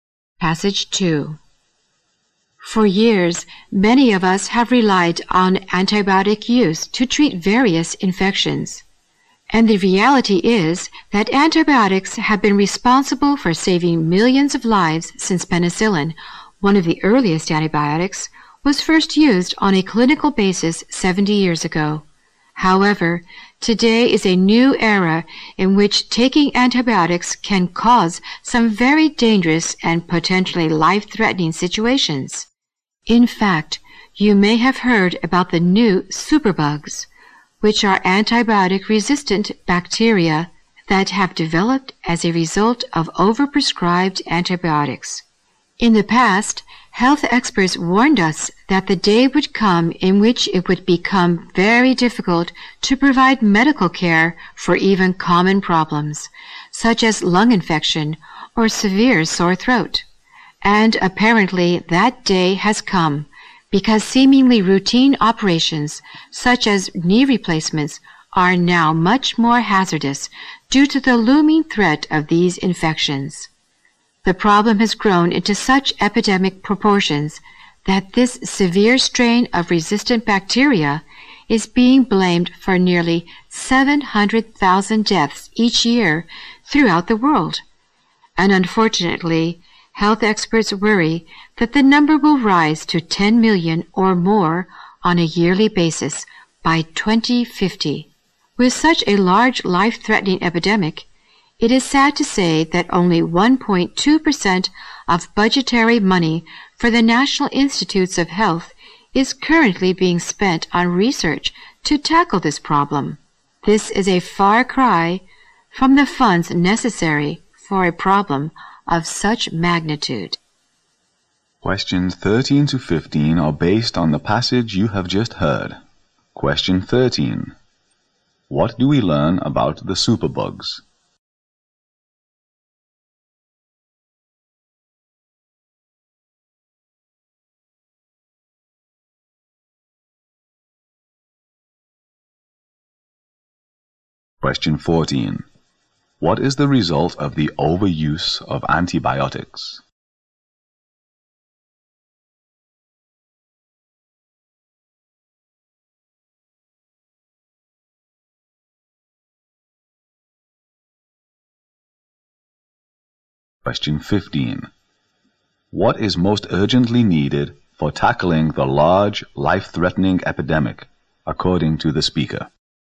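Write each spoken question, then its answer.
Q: What do we learn about the superbugs?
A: They are antibiotic-resistant bacteria caused by overprescribed antibiotics

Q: What is most urgently needed for tackling the large, life-threatening epidemic, according to the speaker?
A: More research funding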